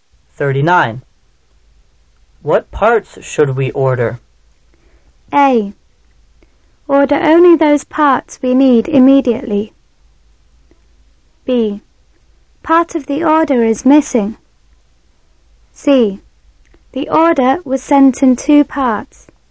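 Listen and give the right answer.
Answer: A: Order only those parts we need immediately.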